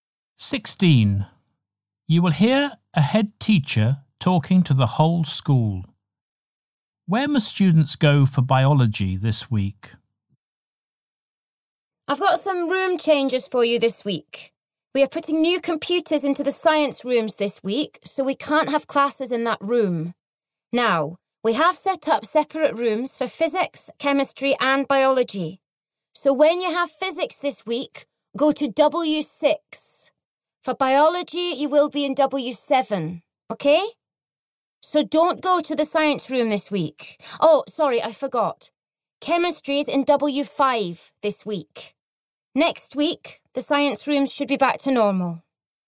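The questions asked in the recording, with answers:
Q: Where must students go for biology this week?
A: W7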